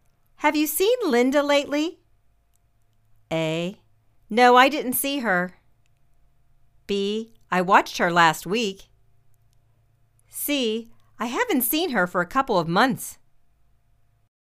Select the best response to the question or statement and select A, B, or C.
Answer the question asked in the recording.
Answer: I haven't seen her for a couple of months.